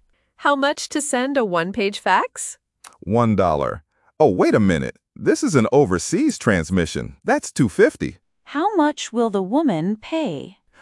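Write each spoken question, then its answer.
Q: How much will the woman pay?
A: $2.50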